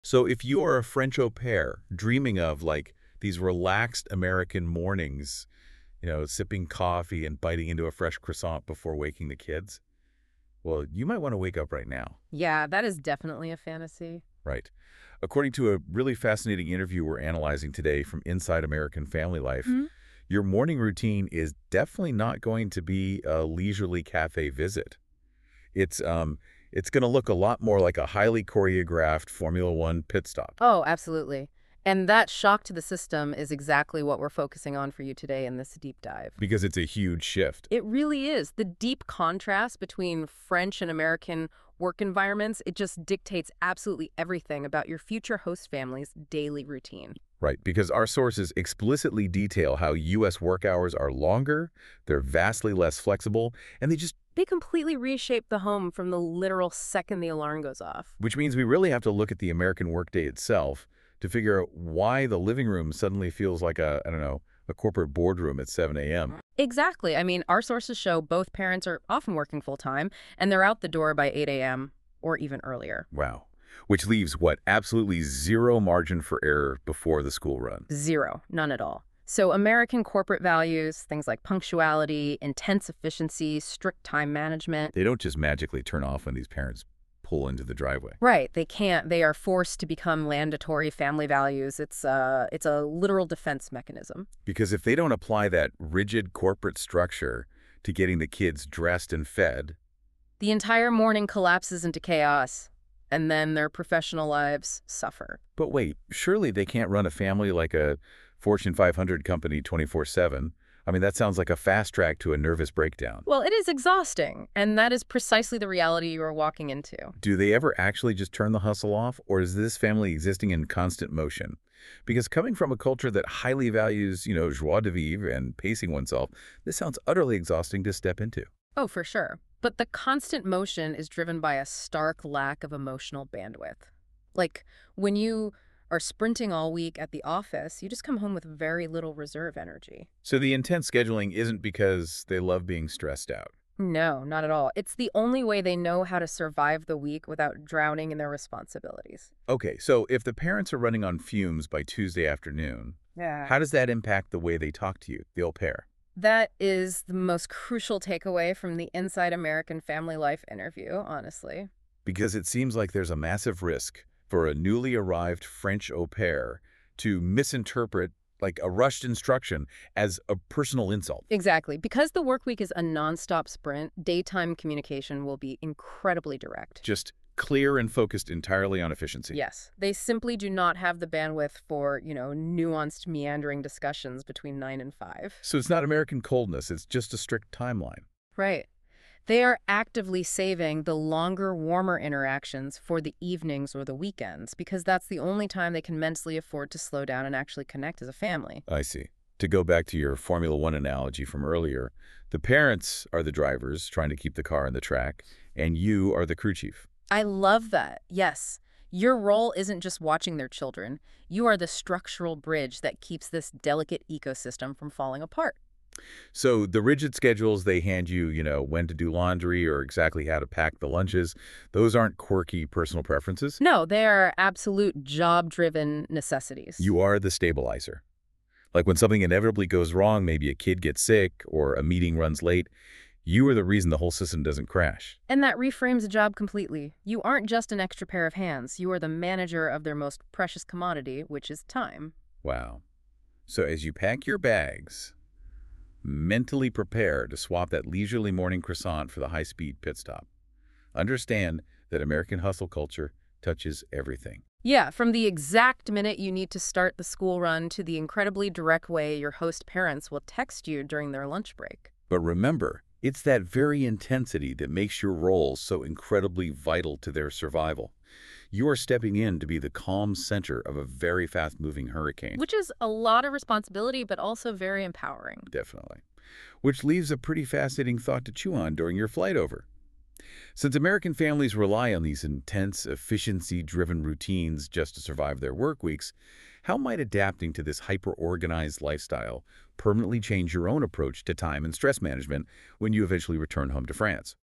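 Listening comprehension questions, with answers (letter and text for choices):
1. How do the parents describe their work schedules?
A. Flexible and unpredictable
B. Structured and busy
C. Short and relaxed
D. Unimportant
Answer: B. Structured and busy

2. Why do the parents start their day early?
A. They enjoy mornings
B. They have free time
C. They need to prepare for their workday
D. They don't work in the afternoon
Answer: C. They need to prepare for their workday

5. Which value from American work culture is emphasized at home?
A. Creativity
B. Independence only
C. Punctuality and efficiency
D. Silence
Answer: C. Punctuality and efficiency

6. Why is time management important for this family?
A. They don't like planning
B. Their schedule is busy and organized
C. They prefer spontaneity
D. They work part-time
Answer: B. Their schedule is busy and organized

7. How do the parents usually communicate with their au pair during the day?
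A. Long detailed conversations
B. No communication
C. Clear and efficient communication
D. Only written notes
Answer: C. Clear and efficient communication

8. When do the parents usually have more time to talk in detail?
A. During work meetings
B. Early in the morning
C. Evenings or at the end of the week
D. Never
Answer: C. Evenings or at the end of the week

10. What should au pairs understand about the parents' lifestyle?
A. It is very relaxed and unplanned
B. It is influenced by their jobs and schedules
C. It has no structure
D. It is only focused on family time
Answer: B. It is influenced by their jobs and schedules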